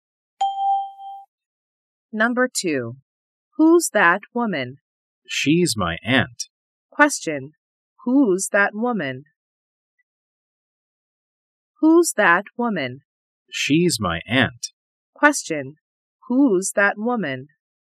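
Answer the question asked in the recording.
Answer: She's my aunt.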